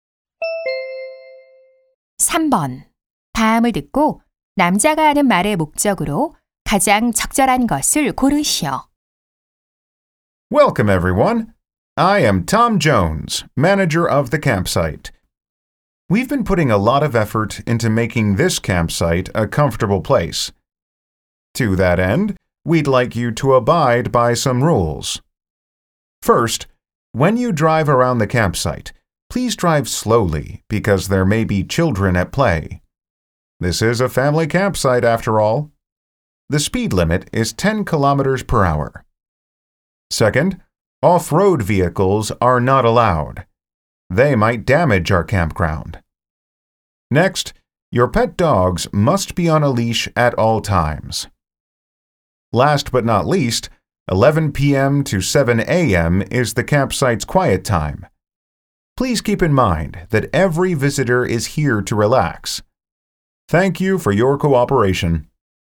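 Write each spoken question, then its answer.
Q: 다음을 듣고 남자가 하는 말의 목적으로 가장 적절한 것을 고르시오.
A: 캠핑장 이용 규칙을 안내하려고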